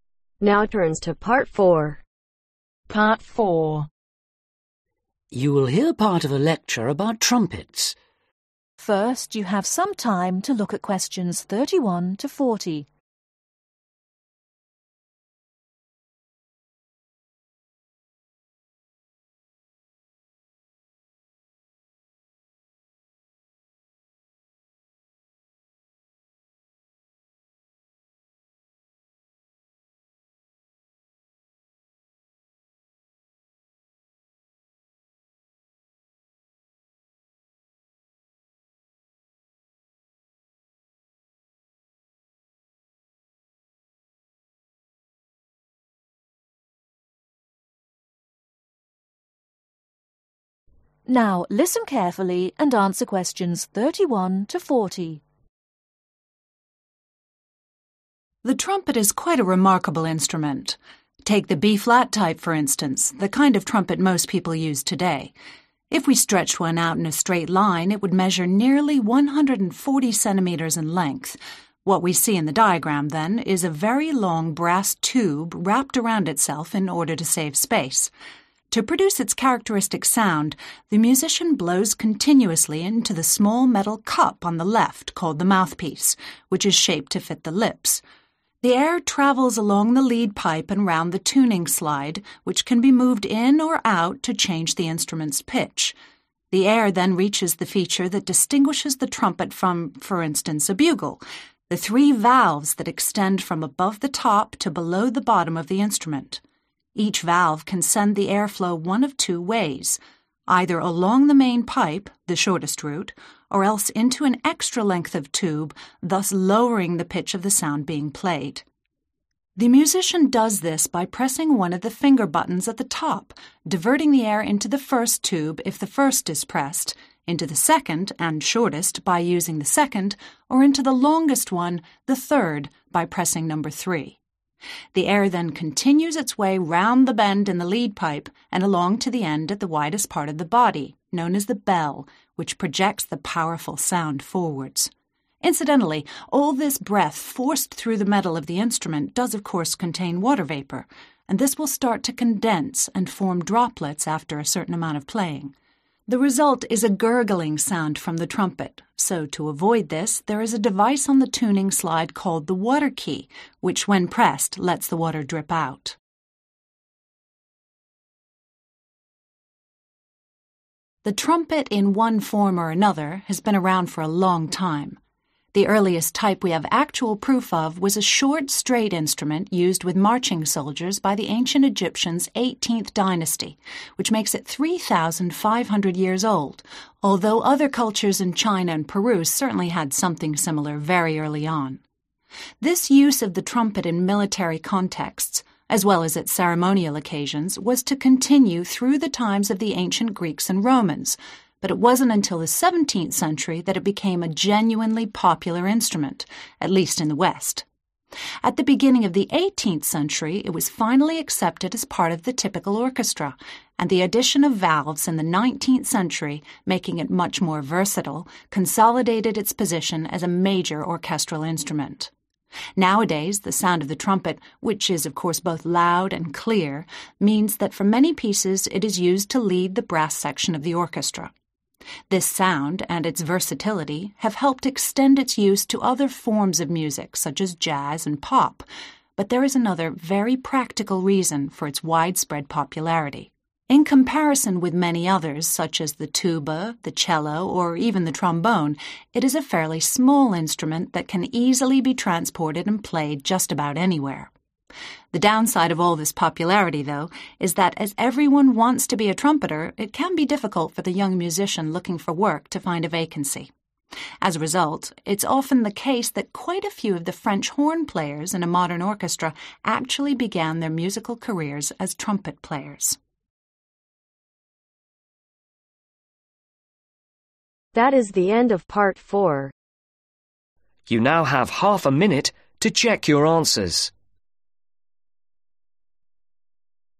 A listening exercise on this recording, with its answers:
Complete these sentences. Write ONE WORD ONLY for each answer.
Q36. First evidence of trumpet in Ancient Egypt 3500 (36) ........... ago.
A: YEARS

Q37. Became orchestral instrument in early (37) ............ century.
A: EIGHTEENTH

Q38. The trumpet often leads the brass section because of its loud and (38) ............ sound.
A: CLEAR

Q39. The trumpet is quite (39) ............ compared with other instruments.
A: SMALL

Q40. Some trumpeters now play the (40) ............. horn instead.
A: FRENCH